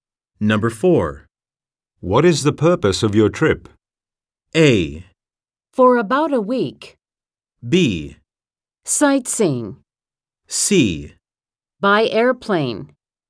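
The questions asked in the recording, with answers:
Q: What is the purpose of your trip?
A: B: Sightseeing.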